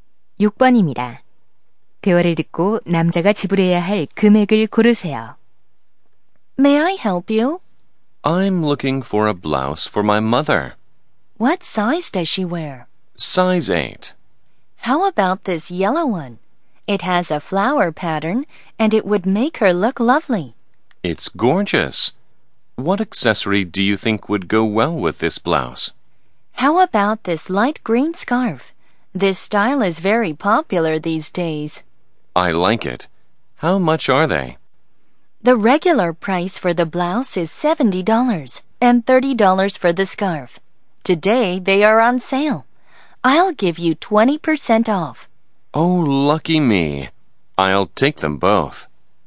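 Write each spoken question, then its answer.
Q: 대화를 듣고 남자가 지불해야 할 금액을 고르세요.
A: $80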